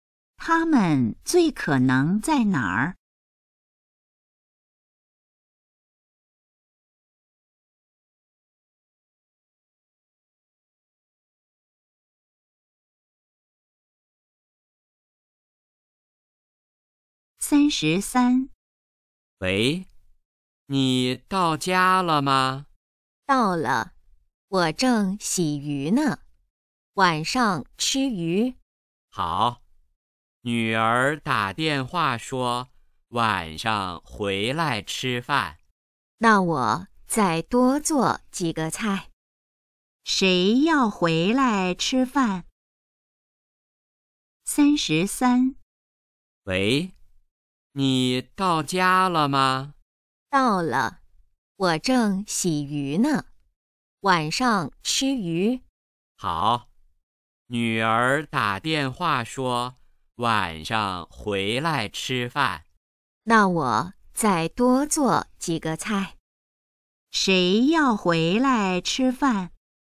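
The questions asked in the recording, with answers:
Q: 谁要回来吃饭?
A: 女儿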